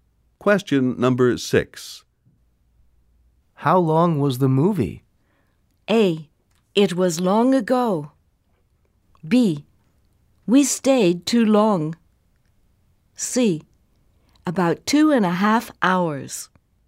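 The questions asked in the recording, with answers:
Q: How long was the movie?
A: C: About 2.5 hours.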